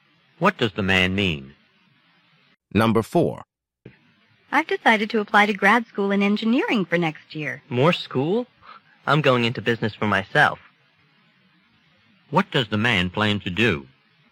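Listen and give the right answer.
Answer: Start his own business.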